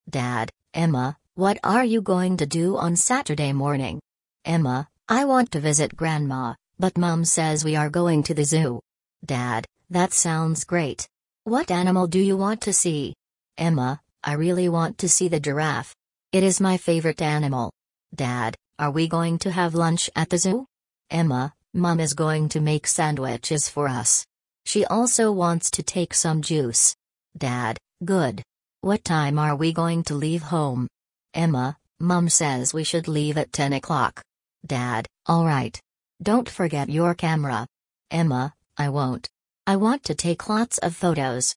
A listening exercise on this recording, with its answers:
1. Who is speaking to Emma?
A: Her father.

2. What is Emma going to do on Saturday morning?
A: Go to the zoo.

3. What animal does Emma want to see?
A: A giraffe.

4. What food are they going to take?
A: Sandwiches.

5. What time are they going to leave home?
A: At ten o'clock.

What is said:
Dad: Emma, what are you going to do on Saturday morning?
Emma: I want to visit Grandma, but Mum says we are going to the zoo.
Dad: That sounds great. What animal do you want to see?
Emma: I really want to see the giraffe. It is my favourite animal.
Dad: Are we going to have lunch at the zoo?
Emma: Mum is going to make sandwiches for us. She also wants to take some juice.
Dad: Good. What time are we going to leave home?
Emma: Mum says we should leave at ten o'clock.
Dad: All right. Don't forget your camera.
Emma: I won't. I want to take lots of photos.

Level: 4 класс